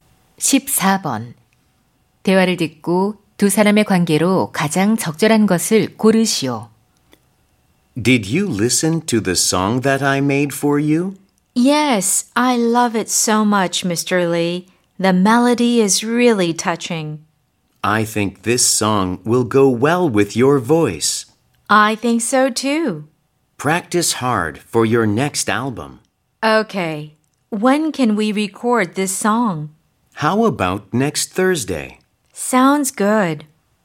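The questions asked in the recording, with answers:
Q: 대화를 듣고 두 사람의 관계로 가장 적절한 것을 고르시오.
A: 작곡가 - 가수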